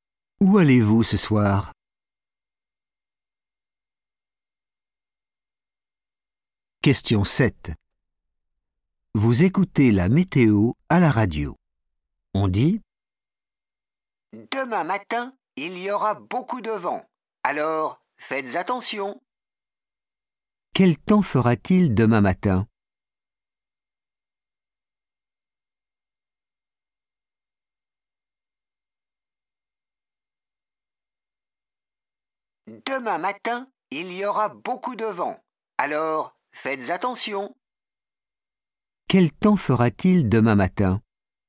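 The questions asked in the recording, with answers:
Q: Quel temps fera-t-il demain matin ?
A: beaucoup de vent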